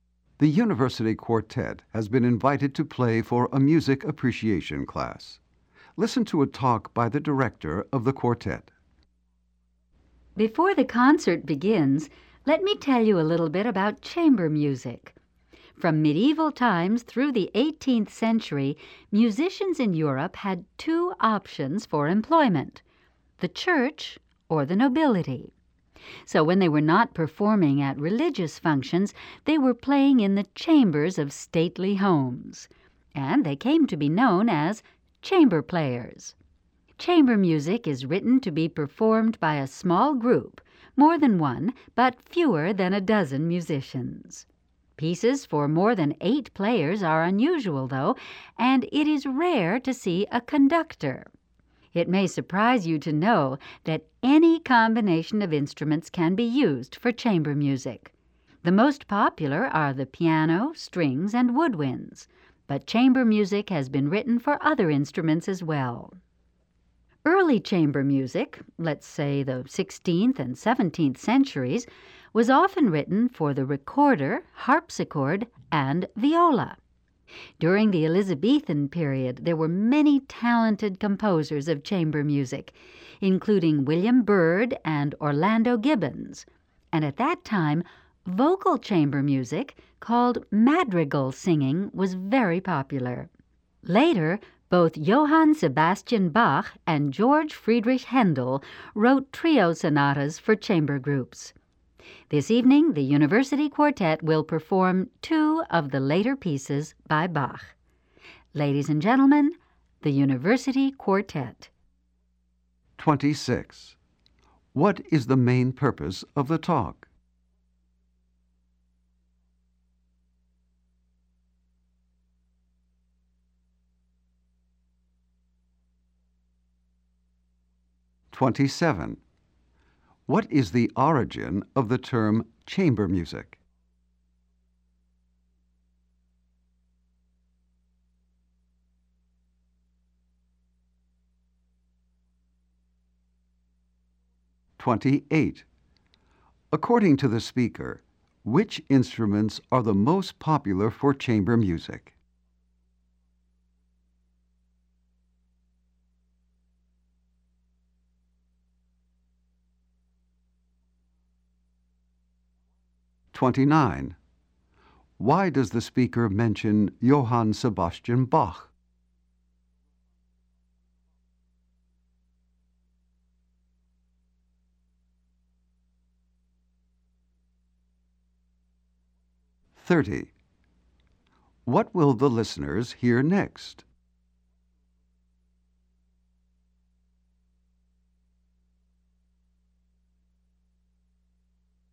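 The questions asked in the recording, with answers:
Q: What is the main purpose of the talk?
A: To introduce chamber music before a concert

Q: What is the origin of the term chamber music?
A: Musicians played in the chambers of stately homes.

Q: According to the speaker, which instruments are the most popular for chamber music?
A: Piano, strings, and woodwinds

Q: Why does the speaker mention Johann Sebastian Bach?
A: The quartet will perform two of his pieces.

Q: What will the listeners hear next?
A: A performance by the University Quartet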